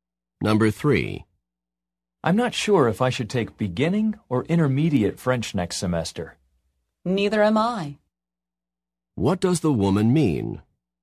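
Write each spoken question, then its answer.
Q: What does the woman mean?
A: She also isn't sure which French level to take.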